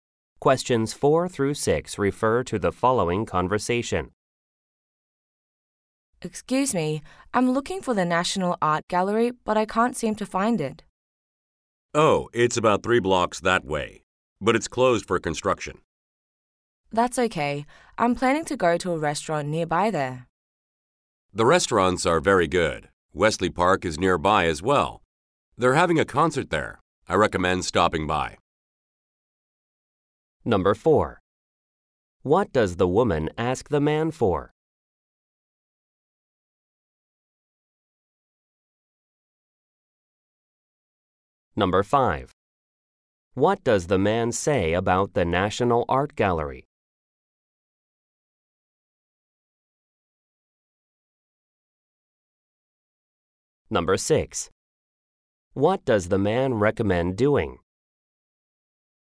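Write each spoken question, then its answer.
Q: What does the woman ask the man for?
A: Directions to the National Art Gallery

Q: What does the man say about the National Art Gallery?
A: It's closed for construction

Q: What does the man recommend doing?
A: Stopping by the concert at Wesley Park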